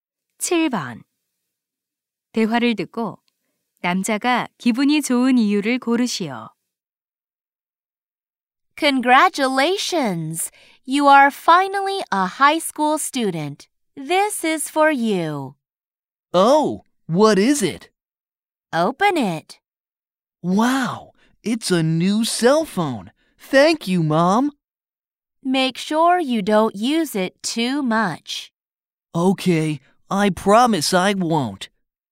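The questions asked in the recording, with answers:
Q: 대화를 듣고 남자가 기분이 좋은 이유를 고르시오.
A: 새 휴대전화를 선물 받아서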